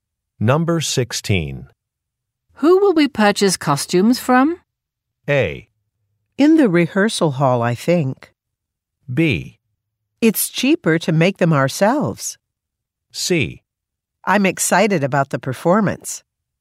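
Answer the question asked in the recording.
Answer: B: It's cheaper to make them ourselves.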